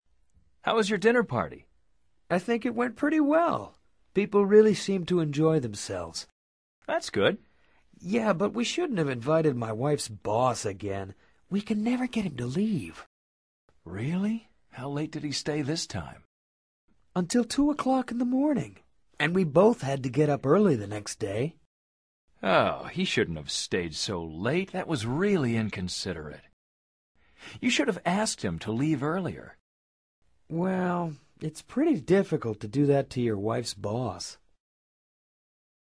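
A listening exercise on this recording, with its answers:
Activity 128: Basándote en los comentarios anteriores, selecciona las opciones más adecuadas para cada oración. Verifica luego las respuestas correctas.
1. How was Eddy's dinner party?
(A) People enjoyed his wife's boss.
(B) The party was pretty well.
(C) His wife's boss didn't enjoy himself.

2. What time did Eddy get rid of his wife's boss?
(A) Three o'clock in the morning.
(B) Two o'clock in the morning.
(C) One o'clock in the morning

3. What sort of person is his wife's boss?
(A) He seems rather shy and talkative.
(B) He doesn't care about people's needs.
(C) Quite considerate.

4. Why didn't Eddy ask him to leave earlier?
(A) It's pretty difficult to do that.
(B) It's easy for Eddy to do that.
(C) It's easy for his wife to do that.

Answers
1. (B) The party was pretty well.
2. (B) Two o'clock in the morning.
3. (B) He doesn't care about people's needs.
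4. (A) It's pretty difficult to do that.

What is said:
How was your dinner party?
I think it went pretty well. People really seemed to enjoy themselves.
That's good.
Yeah, but we shouldn't have invited my wife's boss again. We can never get him to leave!
Really? How late did he stay this time?
Until two o'clock in the morning! And we both had to get up early the next day.
Oh, he shouldn't have stayed so late. That was really inconsiderate. You should have asked him to leave earlier.
Well, it's pretty difficult to do that to your wife's boss!

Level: Nivel Avanzado

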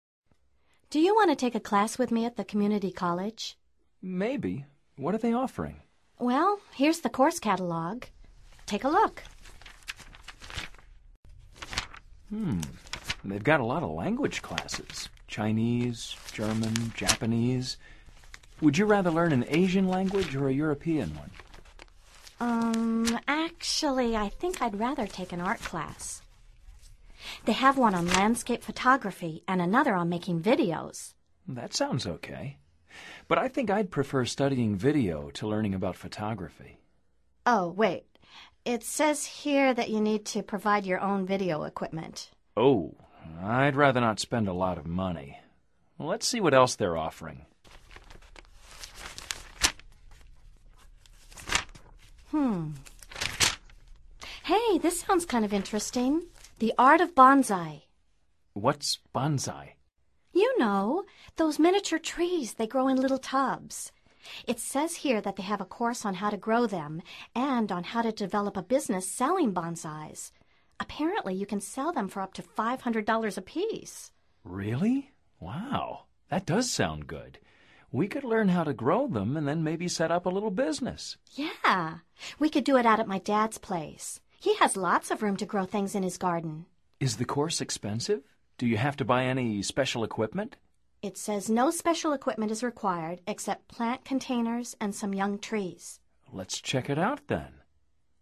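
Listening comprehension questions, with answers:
Activity 7: Basándote en los comentarios anteriores, selecciona las opciones más adecuadas para cada oración. Verifica luego las respuestas correctas.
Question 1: Kevin would prefer studying ...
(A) video to photography.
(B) photography to video.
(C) video to a language course.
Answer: (A) video to photography.

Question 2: They finally decided to take ...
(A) a language course.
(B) an art class on photography.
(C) a course in the art of bonsai.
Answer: (C) a course in the art of bonsai.

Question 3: The course they chose ...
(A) requires special equipment.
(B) does not require special equipment.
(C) only requires a garden.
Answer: (B) does not require special equipment.

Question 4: They decided to take the course because ...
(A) they could learn to grow containers.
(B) it does not require special equipment.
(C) they may set up a little business.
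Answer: (C) they may set up a little business.

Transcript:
Do you want to take a class with me at the community college?
Maybe. What are they offering?
Well, here's the course catalog. Take a look.
They've got a lot of language classes – Chinese, German, Japanese. Would you rather learn an Asian language or a European one?
Um, actually, I think I'd rather take an art class. They have one on landscape photography and another on making videos.
That sounds OK. But I think I'd prefer studying video to learning about photography.
Oh, wait. It says here that you need to provide your own video equipment.
Oh, I'd rather not spend a lot of money. Let's see what else they're offering.
Hey, this sounds kind of interesting: the art of bonsai.
What's bonsai?
You know, those miniature trees they grow in little tubs. It says here that they have a course on how to grow them, and on how to develop a business selling bonsais. 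Apparently, you can sell them for up to $500 apiece.
Really? Wow! That does sound good. We could learn how to grow them and then maybe set up a little business.
Yeah. We could do it out at my dad's place. He has lots of room to grow things in his garden.
Is the course expensive? Do you have to buy any special equipment?
It says no special equipment is required except plant containers and some young trees.
Let's check it out, then.

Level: Nivel Avanzado

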